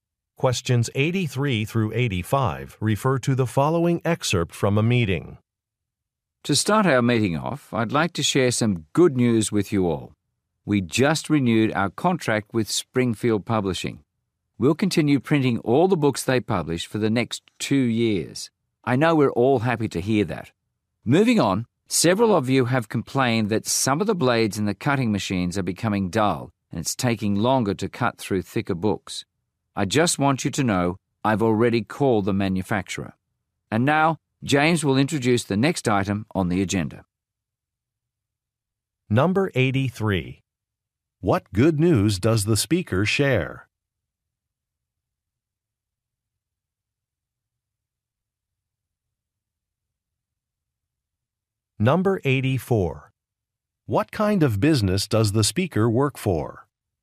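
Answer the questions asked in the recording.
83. A contract was renewed
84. A printing company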